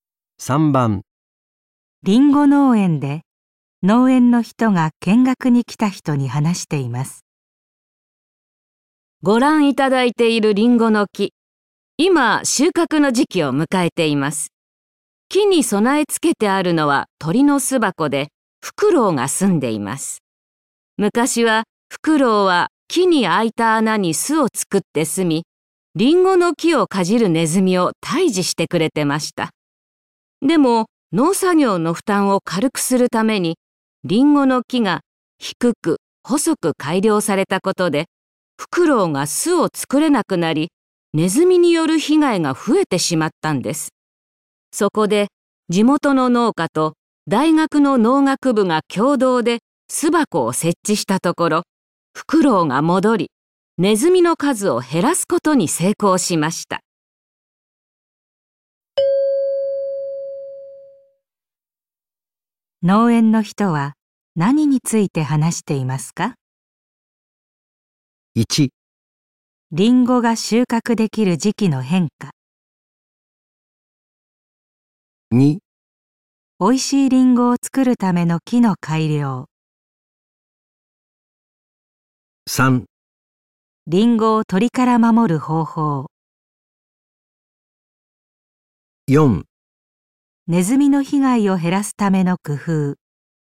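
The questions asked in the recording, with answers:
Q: 農園の人は何について話していますか?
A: 4: ネズミの被害を減らすための工夫。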